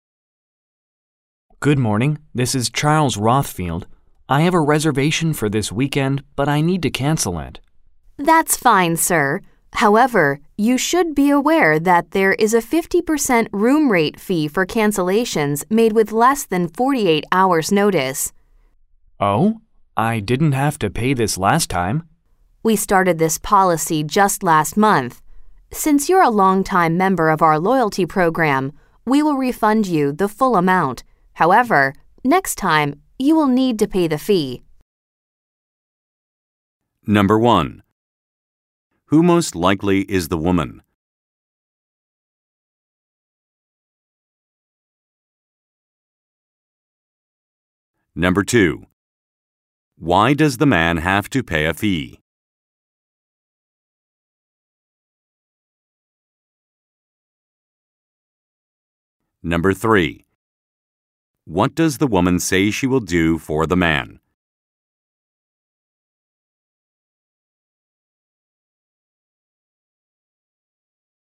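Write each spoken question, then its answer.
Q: Who most likely is the woman?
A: A hotel receptionist

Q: Why does the man have to pay a fee?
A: He is cancelling with less than 48 hours' notice

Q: What does the woman say she will do for the man?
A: Refund him the full amount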